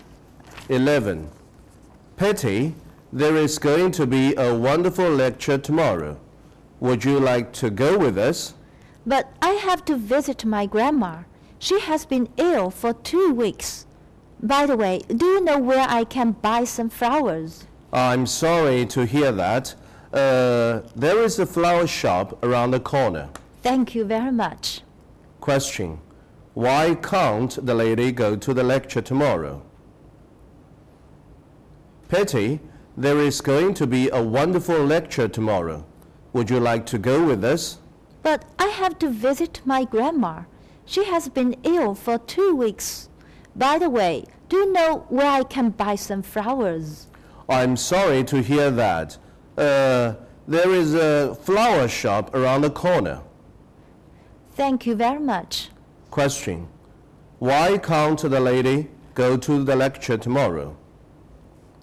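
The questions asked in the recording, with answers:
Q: Why can't the lady go to the lecture tomorrow?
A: She has to visit her sick grandma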